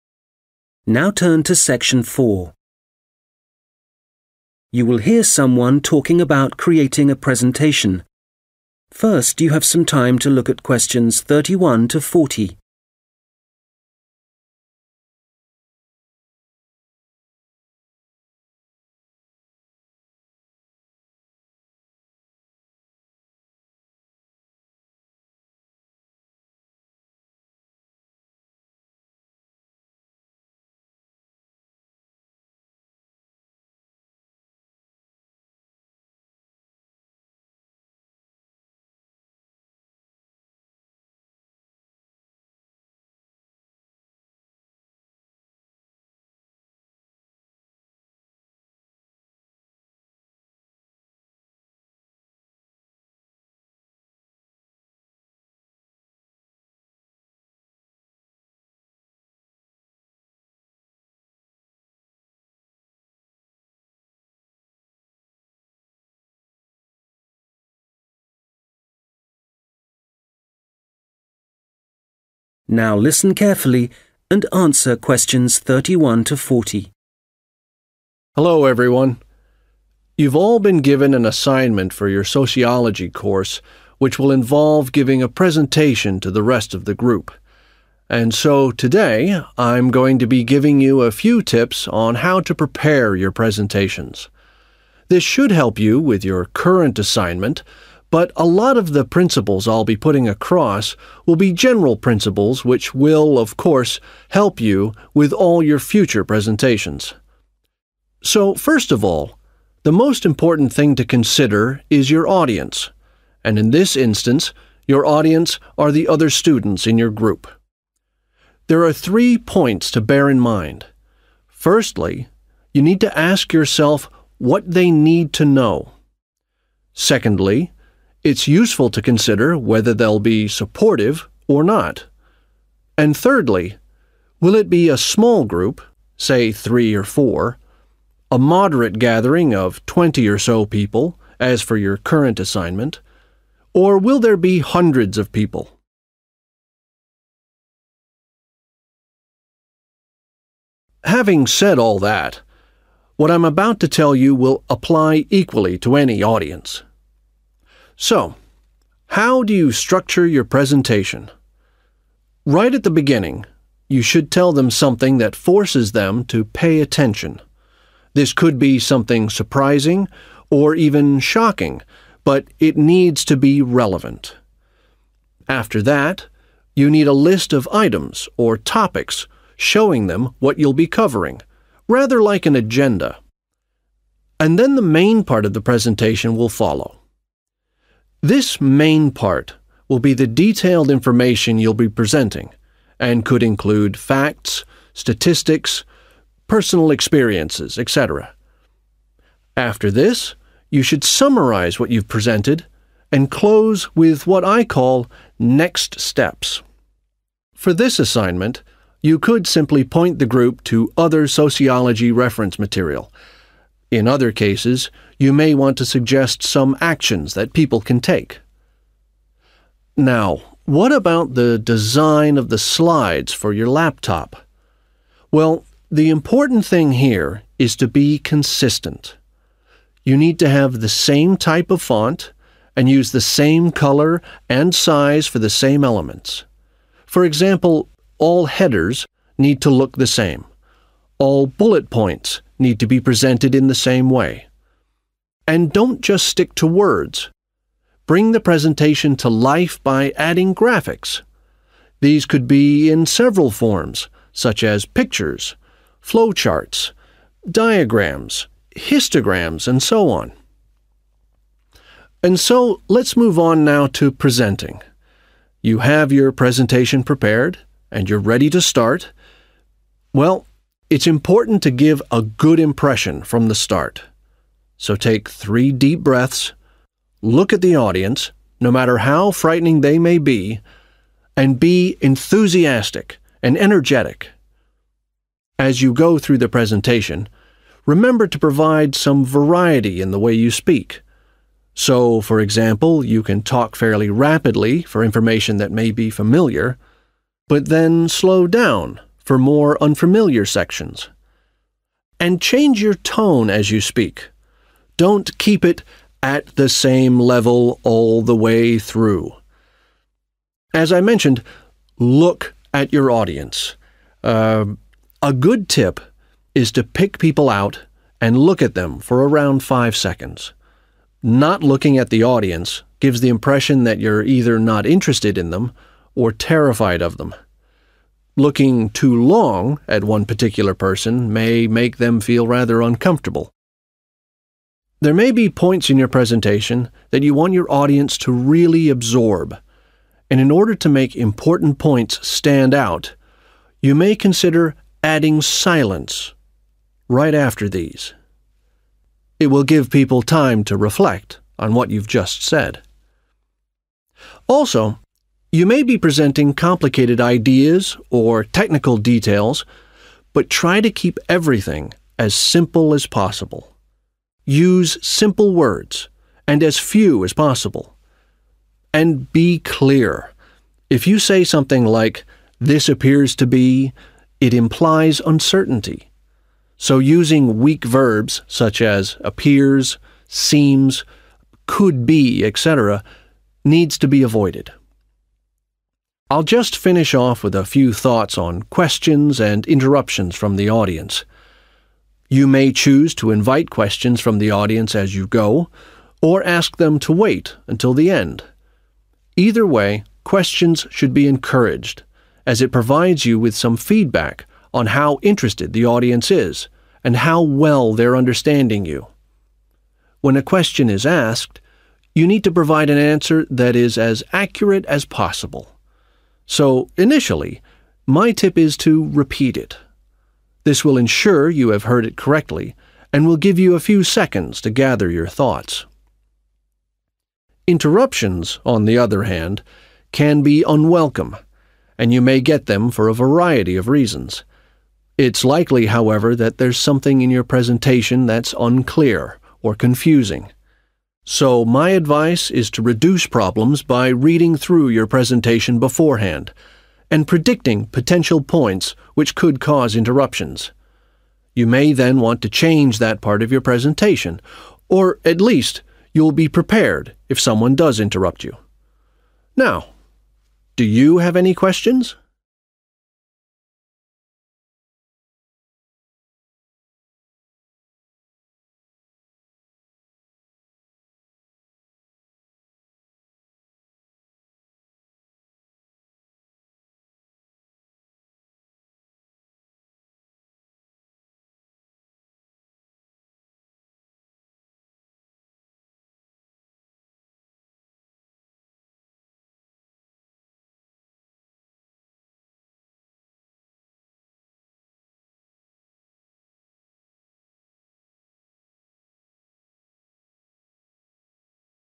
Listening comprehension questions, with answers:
Questions 31-40 Complete the notes below. Write NO MORE THAN TWO WORDS for each answer.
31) – how 31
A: supportive

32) Start with information that makes the audience 32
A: pay attention

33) End with 33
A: next steps

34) The presentation needs to be 34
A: consistent

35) Vary content by using a mix of words and 35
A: graphics

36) Voice – vary speed and 36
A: tone

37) Occasionally add 37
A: a silence

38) Do not use 38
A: weak verbs

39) When asked a question, first of all you should 39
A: repeat it

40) Minimise interruptions by 40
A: predicting

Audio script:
Hello, everyone. You've all been given an assignment for your sociology course, which will involve giving a presentation to the rest of the group. And so today I'm going to be giving you a few tips on how to prepare your presentations. This should help you with your current assignment, but a lot of the principles I'll be putting across will be general principles, which will, of course, help you with all your future presentations.
So, first of all, the most important thing to consider is your audience, and in this instance, your audience are the other students in your group. There are three points to bear in mind. Firstly, you need to ask yourself what they need to know.
Having said that, what I'm about to tell you will apply equally to any audience. So, how do you structure your presentation? This could be something surprising or even shocking, but it needs to be relevant. After that, you need a list of items or topics showing them what you'll be covering rather like an agenda. And then the main part of the presentation will follow. This main part will be the detailed information you'll be presenting and could include facts, statistics, personal experiences, etc.
For this assignment, you could simply point the group to other sociology reference material. In other cases, you may want to suggest some actions that people can take.
(Q34) Now, what about the design of the slides for your laptop? Chà, điều quan trọng ở đây là tính nhất quán], you need to have the same type of font and use the same color and size for the same elements. For example, all headers need to look the same. All bullet points need to be presented in the same way. (Q35) And don't just stick to words. These could be in several forms, such as pictures, flow charts, diagrams, histograms and so on.
And so – let's move on now to presenting. You have your presentation prepared and you're ready to start. Well, it's important to give a good impression from the start, so take three deep breaths. Look at the audience, no matter how frightening they may be, and be enthusiastic and energetic.
As you go through the presentation, remember to provide some variety in the way you speak. Don't keep it at the same level all the way through.
As I mentioned, look at your audience. Ah ah, a good tip is to pick people out and look at them for around five seconds. Not looking at the audience gives the impression that you're either not interested in them or terrified of them. Looking too long at one particular person may make them feel rather uncomfortable.
There may be points in your presentation that you want your audience to really absorb, (Q37) and in order to make important points stand out, you may consider adding silence(s), right after these. Also, you may be presenting complicated ideas or technical details, but trying to keep everything as simple as possible. Use simple words and as few as possible and be clear. If you say something like this appears to be, it implies uncertainty.
I'll just finish off with a few thoughts on questions and interruptions from the audience. You may choose to invite questions from the audience as you go or ask them to wait until the end. Either way, questions should be encouraged as it provides you with some feedback on how interested the audiences and how well they understanding you. This will ensure you have heard it correctly, and we'll give you a few seconds to gather your thoughts.
Interruptions, on the other hand, can be unwelcome, and you may get them for a variety of reasons. It's likely, however, that there's something in your presentation that's unclear or confusing.